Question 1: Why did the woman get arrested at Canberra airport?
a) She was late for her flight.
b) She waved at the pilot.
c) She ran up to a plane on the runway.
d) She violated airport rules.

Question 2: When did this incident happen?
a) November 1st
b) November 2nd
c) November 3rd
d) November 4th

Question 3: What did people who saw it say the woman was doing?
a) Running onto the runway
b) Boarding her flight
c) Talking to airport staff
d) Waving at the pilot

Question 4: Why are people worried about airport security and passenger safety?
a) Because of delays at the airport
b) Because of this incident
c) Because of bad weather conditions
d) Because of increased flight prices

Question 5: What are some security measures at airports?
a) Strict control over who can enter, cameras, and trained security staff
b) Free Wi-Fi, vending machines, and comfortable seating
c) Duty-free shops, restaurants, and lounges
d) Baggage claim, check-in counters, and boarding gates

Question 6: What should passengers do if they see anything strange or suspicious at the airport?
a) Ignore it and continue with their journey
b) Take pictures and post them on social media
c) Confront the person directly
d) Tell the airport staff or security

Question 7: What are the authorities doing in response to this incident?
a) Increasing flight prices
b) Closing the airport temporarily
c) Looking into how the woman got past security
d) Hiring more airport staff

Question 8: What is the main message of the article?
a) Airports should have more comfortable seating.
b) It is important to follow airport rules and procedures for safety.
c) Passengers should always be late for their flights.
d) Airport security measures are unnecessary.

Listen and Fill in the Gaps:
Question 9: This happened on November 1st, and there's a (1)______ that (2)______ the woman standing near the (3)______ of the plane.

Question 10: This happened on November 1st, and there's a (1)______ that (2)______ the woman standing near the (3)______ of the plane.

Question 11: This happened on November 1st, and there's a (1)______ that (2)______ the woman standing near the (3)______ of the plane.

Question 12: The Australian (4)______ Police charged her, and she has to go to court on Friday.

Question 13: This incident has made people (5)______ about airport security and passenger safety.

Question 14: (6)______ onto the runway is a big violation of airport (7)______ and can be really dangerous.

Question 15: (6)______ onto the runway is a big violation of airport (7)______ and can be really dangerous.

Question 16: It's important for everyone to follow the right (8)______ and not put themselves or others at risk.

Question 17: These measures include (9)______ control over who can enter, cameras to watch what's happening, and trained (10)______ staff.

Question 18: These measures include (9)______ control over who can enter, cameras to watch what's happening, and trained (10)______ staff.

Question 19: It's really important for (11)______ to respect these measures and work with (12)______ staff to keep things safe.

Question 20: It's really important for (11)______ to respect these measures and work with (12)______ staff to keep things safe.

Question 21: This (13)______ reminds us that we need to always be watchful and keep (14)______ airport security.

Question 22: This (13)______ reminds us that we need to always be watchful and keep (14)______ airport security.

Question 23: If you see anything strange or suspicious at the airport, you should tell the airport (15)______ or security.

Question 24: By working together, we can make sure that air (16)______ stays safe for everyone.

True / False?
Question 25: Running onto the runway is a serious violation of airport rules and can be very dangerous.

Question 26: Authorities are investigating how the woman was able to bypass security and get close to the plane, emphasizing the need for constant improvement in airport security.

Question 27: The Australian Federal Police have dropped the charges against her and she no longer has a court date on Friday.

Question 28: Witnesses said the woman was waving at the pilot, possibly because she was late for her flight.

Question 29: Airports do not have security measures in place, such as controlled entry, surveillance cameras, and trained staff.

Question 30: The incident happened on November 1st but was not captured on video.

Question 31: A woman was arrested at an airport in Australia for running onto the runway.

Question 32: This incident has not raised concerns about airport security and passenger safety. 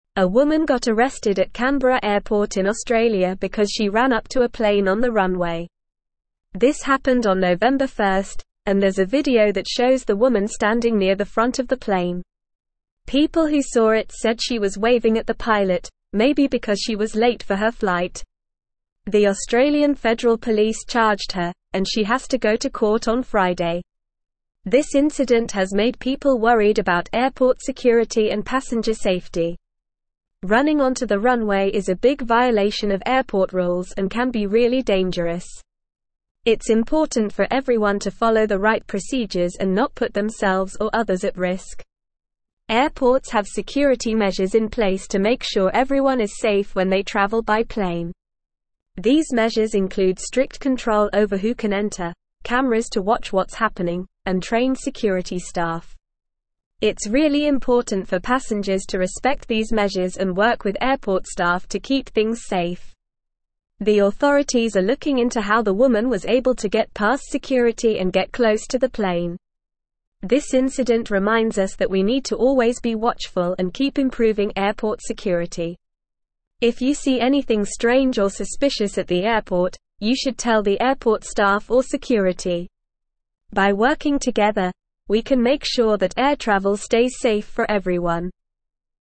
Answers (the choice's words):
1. She ran up to a plane on the runway.
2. November 1st
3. Waving at the pilot
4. Because of this incident
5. Strict control over who can enter, cameras, and trained security staff
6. Tell the airport staff or security
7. Looking into how the woman got past security
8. It is important to follow airport rules and procedures for safety.
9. video
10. shows
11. front
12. Federal
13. worried
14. Running
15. rules
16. procedures
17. strict
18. security
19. passengers
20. airport
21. incident
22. improving
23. staff
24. travel
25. True
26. True
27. False
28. True
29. False
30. False
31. True
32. False

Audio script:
A woman got arrested at Canberra airport in Australia because she ran up to a plane on the runway. This happened on November 1st, and there's a video that shows the woman standing near the front of the plane. People who saw it said she was waving at the pilot, maybe because she was late for her flight. The Australian Federal Police charged her, and she has to go to court on Friday.
This incident has made people worried about airport security and passenger safety. Running onto the runway is a big violation of airport rules and can be really dangerous. It's important for everyone to follow the right procedures and not put themselves or others at risk.
Airports have security measures in place to make sure everyone is safe when they travel by plane. These measures include strict control over who can enter, cameras to watch what's happening, and trained security staff. It's really important for passengers to respect these measures and work with airport staff to keep things safe.
The authorities are looking into how the woman was able to get past security and get close to the plane. This incident reminds us that we need to always be watchful and keep improving airport security. If you see anything strange or suspicious at the airport, you should tell the airport staff or security. By working together, we can make sure that air travel stays safe for everyone.

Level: Level 3